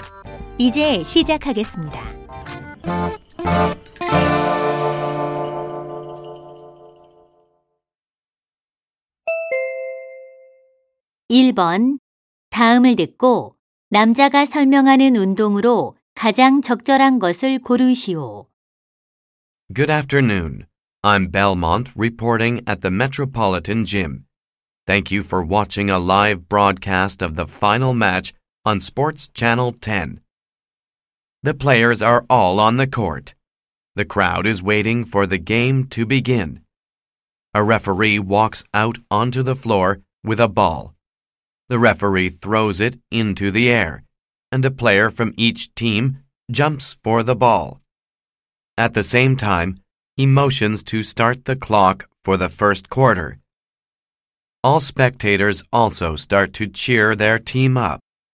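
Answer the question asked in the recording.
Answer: 농구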